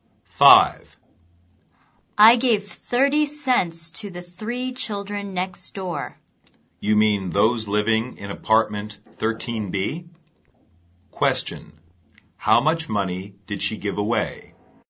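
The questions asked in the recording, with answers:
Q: How much money did she give away?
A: 30 cents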